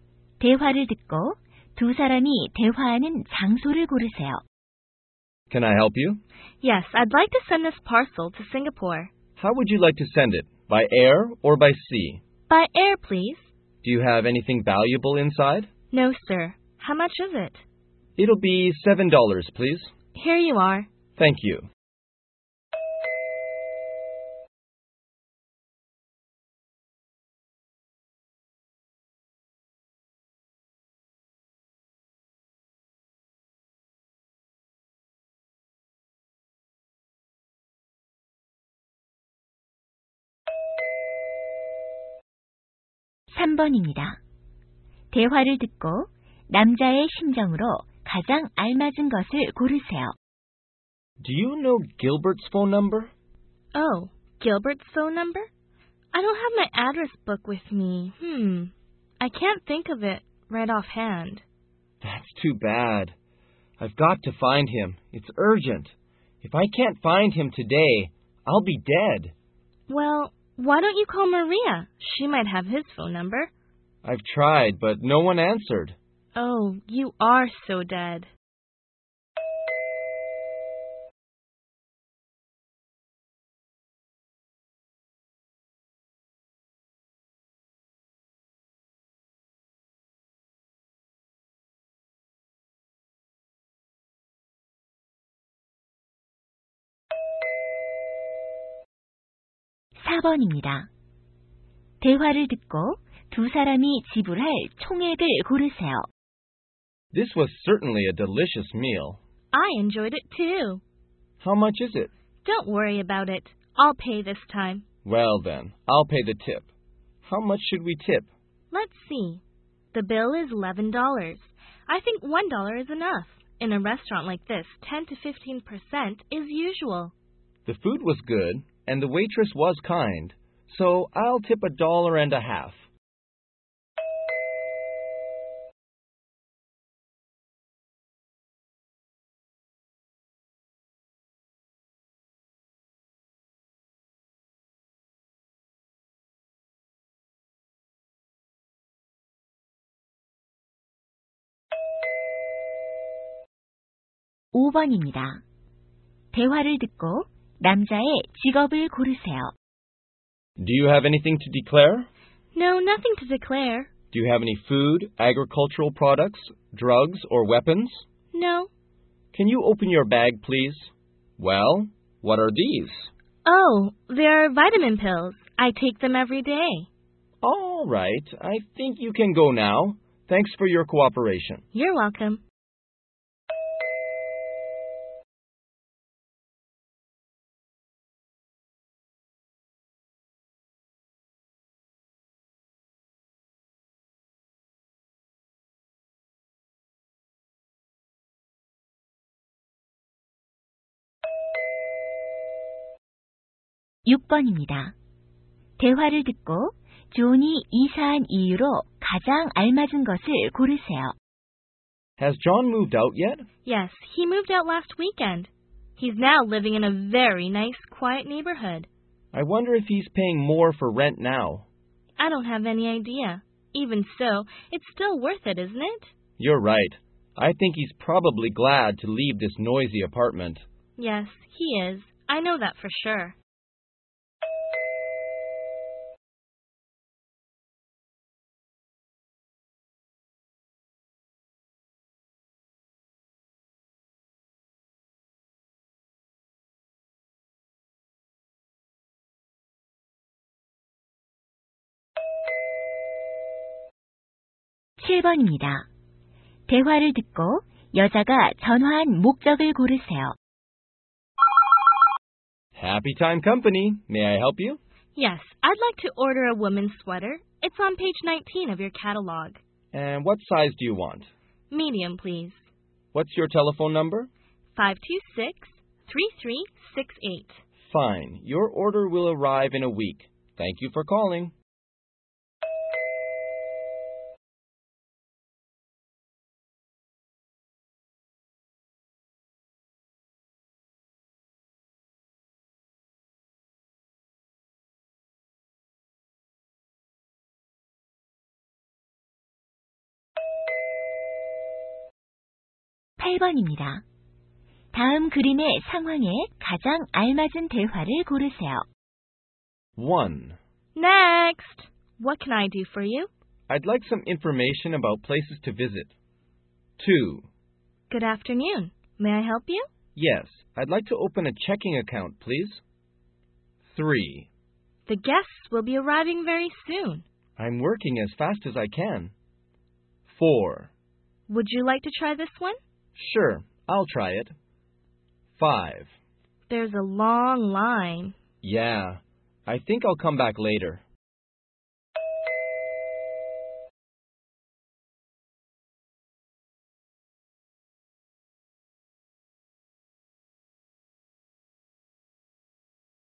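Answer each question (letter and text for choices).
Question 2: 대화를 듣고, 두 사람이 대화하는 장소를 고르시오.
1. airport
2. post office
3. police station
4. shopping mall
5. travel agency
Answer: 2. post office

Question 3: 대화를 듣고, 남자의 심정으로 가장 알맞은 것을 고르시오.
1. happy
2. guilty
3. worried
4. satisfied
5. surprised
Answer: 3. worried

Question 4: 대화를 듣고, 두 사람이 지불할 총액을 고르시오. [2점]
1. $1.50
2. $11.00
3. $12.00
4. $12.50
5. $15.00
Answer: 4. $12.50

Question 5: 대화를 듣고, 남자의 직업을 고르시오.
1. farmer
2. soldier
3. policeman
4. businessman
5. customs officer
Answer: 5. customs officer

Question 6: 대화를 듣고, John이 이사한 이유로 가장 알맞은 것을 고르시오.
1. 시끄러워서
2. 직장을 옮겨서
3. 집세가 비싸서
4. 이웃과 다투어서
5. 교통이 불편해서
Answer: 1. 시끄러워서

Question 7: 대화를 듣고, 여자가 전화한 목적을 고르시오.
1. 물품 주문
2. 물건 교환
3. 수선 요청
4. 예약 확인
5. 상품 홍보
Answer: 1. 물품 주문

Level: 고2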